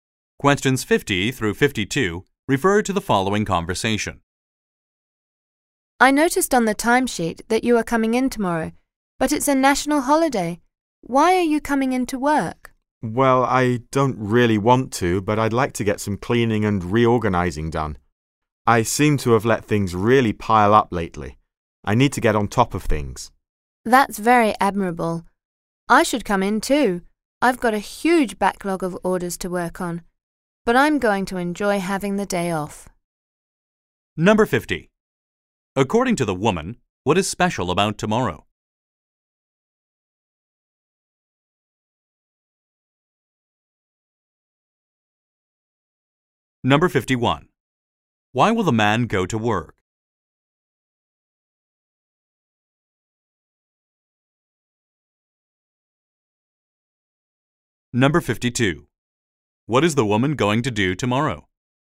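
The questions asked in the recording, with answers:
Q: According to the woman, what is special about tomorrow?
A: It's a national holiday

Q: Why will the man go to work?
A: To do some cleaning and reorganizing

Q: What is the woman going to do tomorrow?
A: Enjoy the day off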